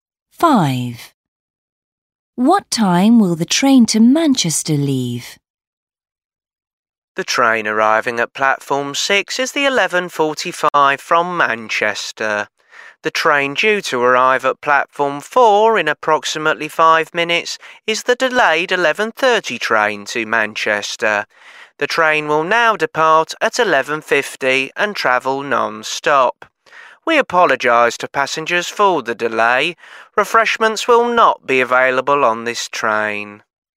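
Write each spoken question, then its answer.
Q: What time will the train to Manchester leave?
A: 11:50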